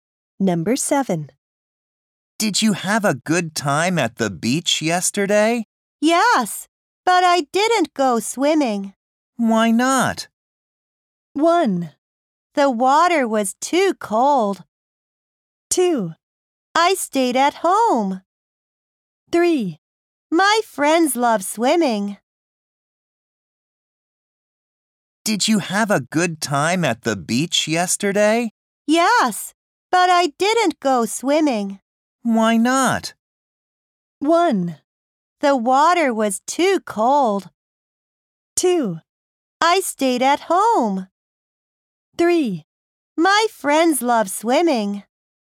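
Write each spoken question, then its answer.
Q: Why not?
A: 1: The water was too cold.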